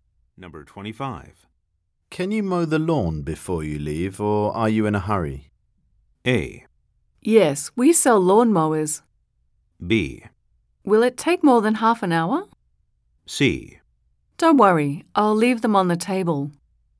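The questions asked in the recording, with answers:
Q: Can you mow the lawn before you leave, or are you in a hurry?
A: B: Will it take more than half an hour?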